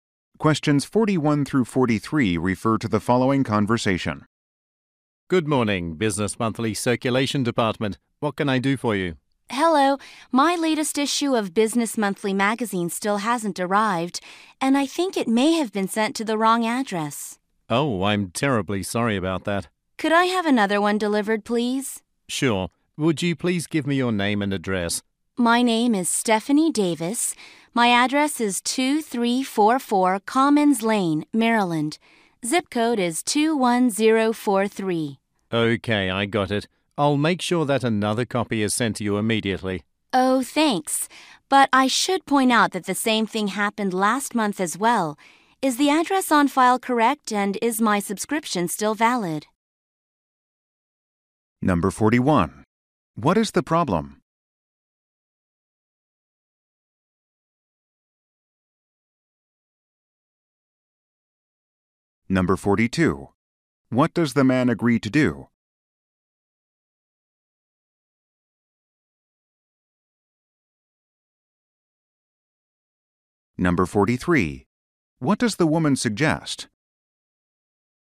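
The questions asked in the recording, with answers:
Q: What is the problem?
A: Her magazine issue hasn't arrived

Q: What does the man agree to do?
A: Send another copy immediately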